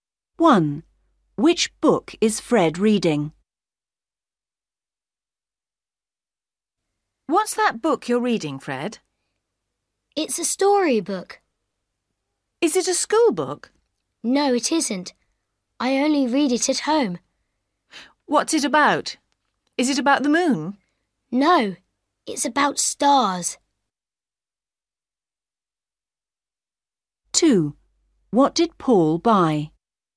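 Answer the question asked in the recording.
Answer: A story book about stars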